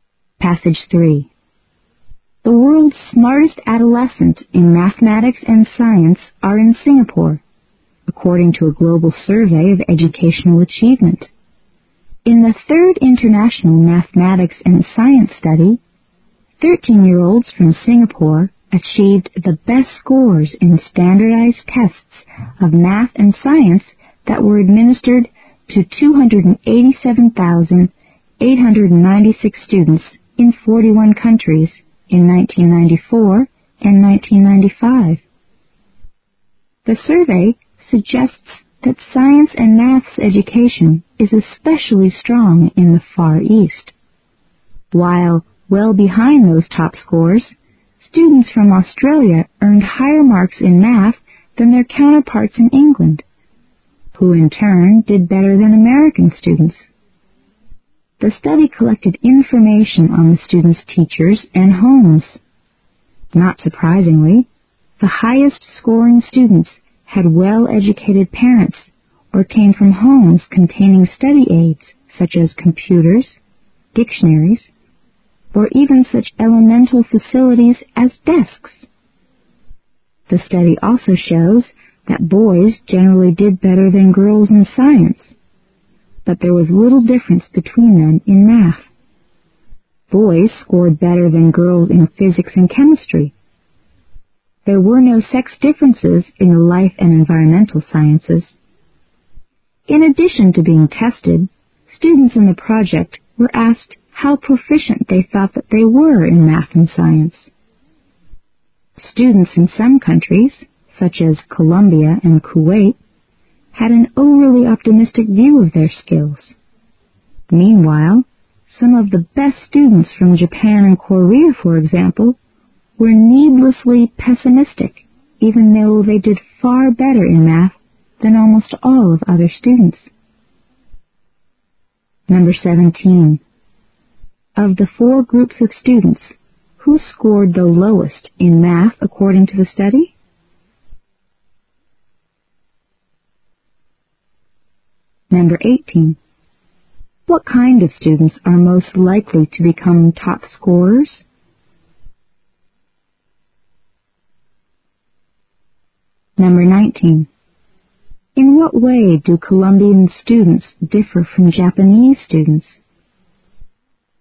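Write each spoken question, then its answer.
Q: Of the four groups of students, who scored the lowest in math according to the study?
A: American students

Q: What kind of students are most likely to become top scorers?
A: Those with well-educated parents or homes with study aids

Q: In what way do Colombian students differ from Japanese students?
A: Colombian students overrate their skills, while Japanese students underrate theirs

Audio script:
The world's smartest adolescence in mathematics and science are in Singapore, according to a global survey of educational achievement. In the 3rd International Mathematics and Science study, 13-year-olds from Singapore achieved the best scores in standardized tests of maths and science that were administered to 287, 896 students in 41 countries in 1994 and 1995. The survey suggests that science and maths education is especially strong in the Far East. 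While well behind those top scores, students from Australia earned higher marks in maths than their counterparts in England, who in turn did better than American students. The study collected infomp3ation on the students' teachers and homes. Not surprisingly, the highest-scoring students had well-educated parents or came from homes containing study-aids such as computers, dictionaries or even such elemental facilities as desks. The study shows that boys generally did better than girls in science, but there was little difference between them in maths. Boys scored better than girls in physics and chemistry. There were no sex differences in the life and environmental sciences. In addition to being tested, students in the project were asked how proficient they thought they were in maths and science. Students in some countries, such as Columbia and Kuwait, had an overly optimistic view of their skills. 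Meanwhile, some of the best students from Japan and Korea for example were needlessly pessimistic even though they did far better in maths than almost all of other students.
Of the 4 groups of students, who scored the lowest in maths according to the survey?
19. In what way do Columbian students differ from Japanese students?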